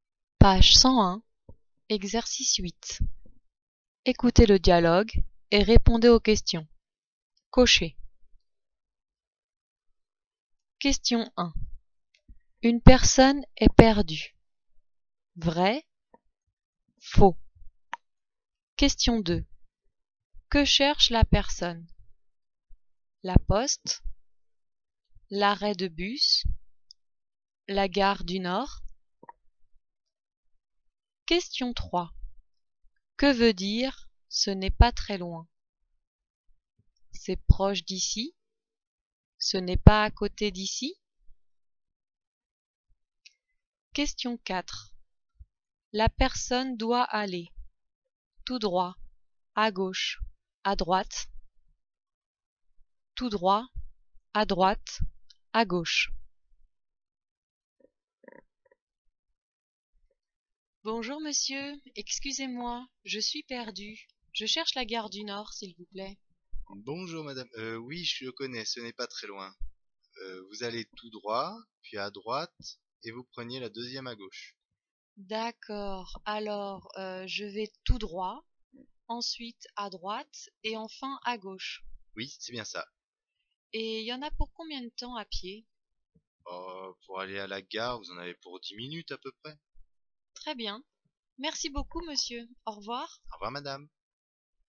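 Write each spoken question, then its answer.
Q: Une personne est perdue.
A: Vrai

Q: Que cherche la personne?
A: La gare du Nord

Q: Que veut dire « ce n'est pas très loin » ?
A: C'est proche d'ici

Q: La personne doit aller tout droit, à gauche, à droite.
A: Tout droit, à droite, à gauche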